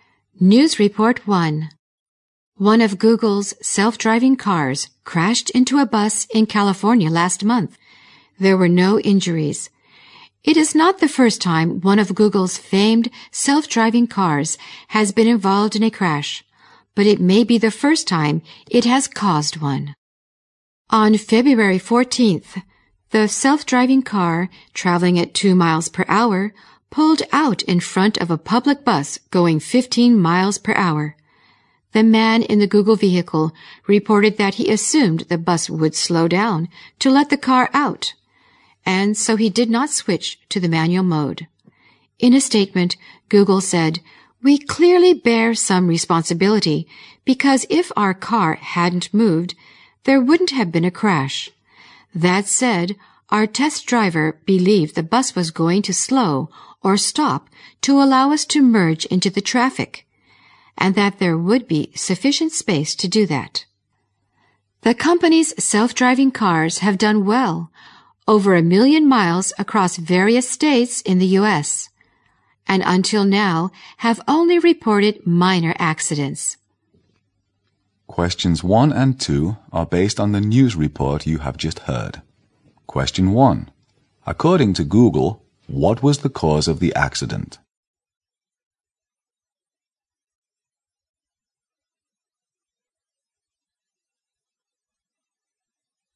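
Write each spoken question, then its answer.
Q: According to Google, what was the cause of the accident?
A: The test driver assumed the bus would slow down to let the car out, so the car pulled out in front of it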